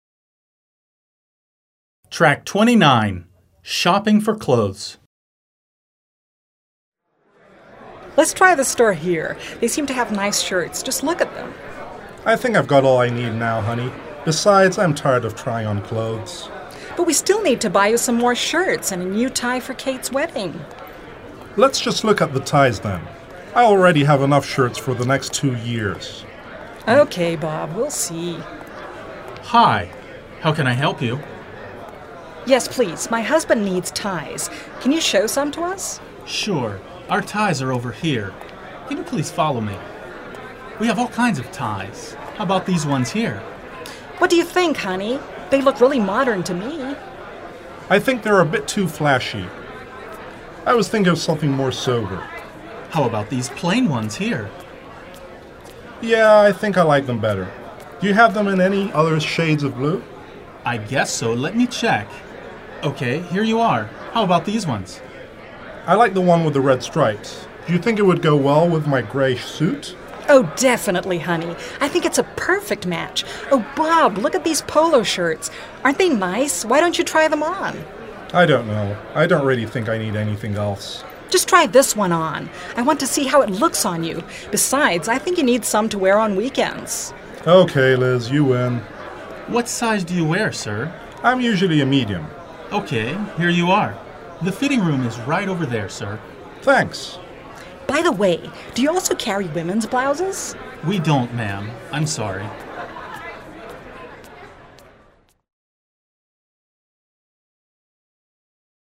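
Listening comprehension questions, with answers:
Dialogue comprehension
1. Bob thinks he needs to buy some more shirts.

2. Bob is tired of trying on clothes.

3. Liz wants Bob to try on a pair of pants.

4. Bob likes the ties the clerk shows him immediately.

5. The clerk tells Liz that they don't carry women's dresses.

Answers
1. False
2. True
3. False
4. False
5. False

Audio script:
They seem to have nice shirts. Just look at them!
Bob: I think I've got all I need now honey. Besides, I'm tired of trying on clothes...
Liz: But we still need to buy you some more shirts and a new tie for Kate's wedding.
Bob: Let's just look at the ties then. I already have enough shirts for the next two years.
Liz: OK, Bob. We'll see...
Clerk: Hi. How can I help you?
Liz: Yes, please. My husband needs ties. Can you show some to us?
Clerk: Sure. Our ties are over here. Can you please follow me? (leading customers to another section of the store) We have all kinds of ties. 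How about these ones here?
Liz: What do you think honey? They look really modern to me.
Bob: I think they are a bit too flashy. I was thinking of something more sober.
Clerk: How about these plain ones here?
Bob: Yeah, I think I like them better. Do you have them in any other shades of blue?
Clerk: I guess so. Let me check. OK, here you are, how about these ones?
Bob: I like the one with the red stripes. Do you think it would go well with my grey suit?
Liz: Oh definitely honey! I think it's a perfect match. Oh, Bob. Look at these polo shirts. Aren't they nice? Why don't you try them on?
Bob: I don't know. I don't really think I need anything else.
Liz: Just try this one on. I want to see how it looks on you. Besides I think you need some to wear on weekends.
Bob: OK, Liz, you win!
Clerk: What size do you wear sir?
Bob: I'm usually a medium.
Clerk: OK, here you are. The fitting room is right over there, sir.
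Bob: Thanks.
Liz: By the way, do you also carry women's blouses?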